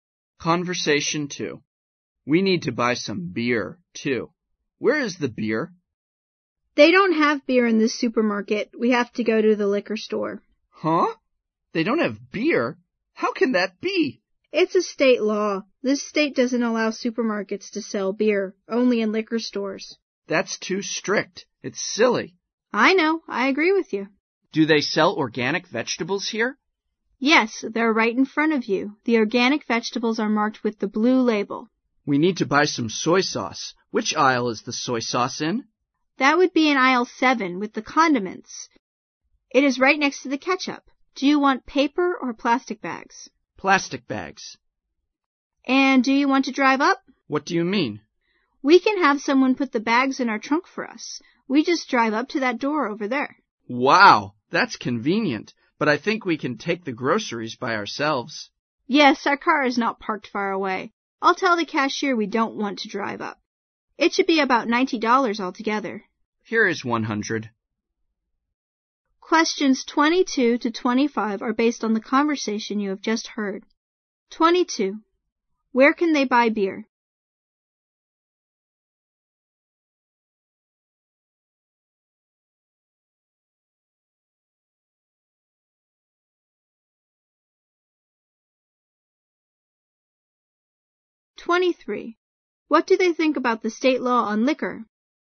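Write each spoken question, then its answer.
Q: Where can they buy beer?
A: At the liquor store.

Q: What do they think about the state law on liquor?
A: It's too strict and silly.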